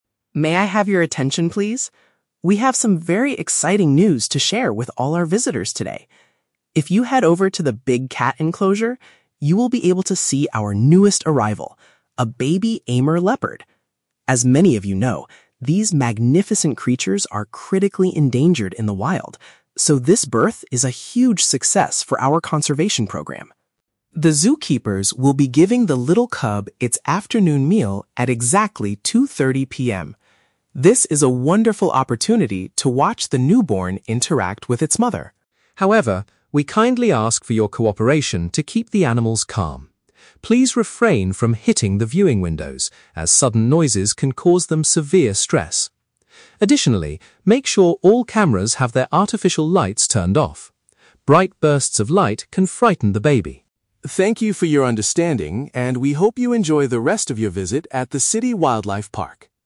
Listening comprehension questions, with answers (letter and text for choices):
Listen to a public announcement at a zoo and choose the best answer (A, B, or C) for each question.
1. What is the main reason the zoo is celebrating the birth of the baby animal?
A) Its species is at a severe risk of disappearing in nature.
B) It is the first leopard to be brought in directly from the wild.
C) It has grown fast enough to survive without its mother's help.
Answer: A) Its species is at a severe risk of disappearing in nature.

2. What is scheduled to take place at 2:30 PM?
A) Zoo visitors will have the chance to feed the baby leopard.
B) The park workers will provide the newborn with its food.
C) The mother and baby will be moved to a larger viewing area.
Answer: B) The park workers will provide the newborn with its food.

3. What is one specific rule visitors must follow at the enclosure?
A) They must avoid speaking loudly when standing near the animals.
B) They are not allowed to bring their own food near the viewing windows.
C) They need to disable the flash function on their photography devices.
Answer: C) They need to disable the flash function on their photography devices.

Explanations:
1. The announcer says the animals are "critically endangered in the wild." Option A uses synonyms: "severe risk of disappearing in nature."
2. The announcer states that the "zookeepers will be giving the little cub its afternoon meal." Option B paraphrases this as "park workers will provide the newborn with its food."
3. The announcer asks visitors to "make sure all cameras have their artificial lights turned off." Option C paraphrases this as "disable the flash function on their photography devices."

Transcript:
Announcer: May I have your attention, please? We have some very exciting news to share with all our visitors today. If you head over to the Big Cat Enclosure, you will be able to see our newest arrival: a baby Amur leopard. As many of you know, these magnificent creatures are critically endangered in the wild, so this birth is a huge success for our conservation program.
The zookeepers will be giving the little cub its afternoon meal at exactly 2:30 PM. This is a wonderful opportunity to watch the newborn interact with its mother.
However, we kindly ask for your cooperation to keep the animals calm. Please refrain from hitting the viewing windows, as sudden noises can cause them severe stress. Additionally, make sure all cameras have their artificial lights turned off. Bright bursts of light can frighten the baby.
Thank you for your understanding, and we hope you enjoy the rest of your visit at the City Wildlife Park!